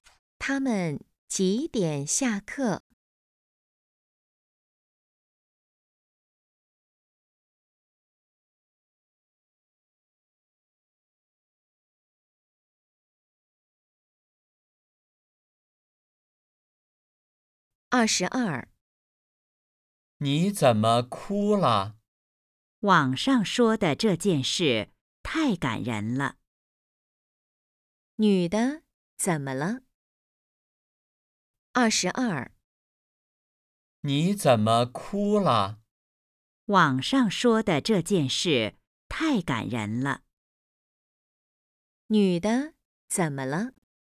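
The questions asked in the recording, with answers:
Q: 女的怎么了?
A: 被网上的事感动哭了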